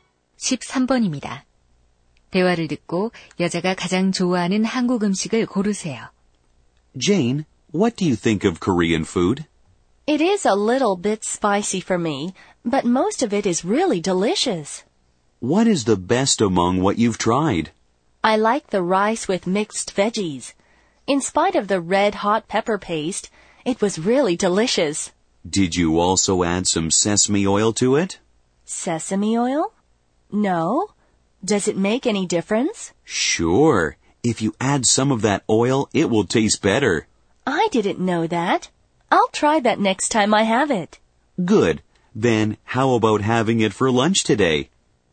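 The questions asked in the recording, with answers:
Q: 대화를 듣고 여자가 가장 좋아하는 한국 음식을 고르세요.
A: 비빔밥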